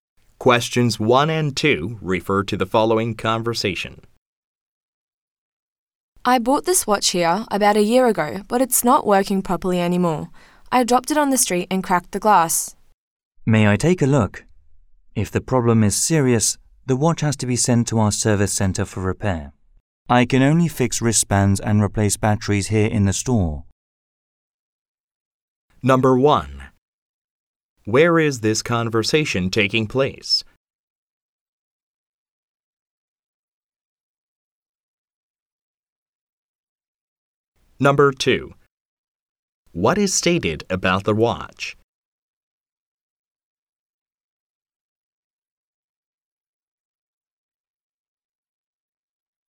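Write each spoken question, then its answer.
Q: Where is this conversation taking place?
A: In a watch store

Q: What is stated about the watch?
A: Its glass is cracked because it was dropped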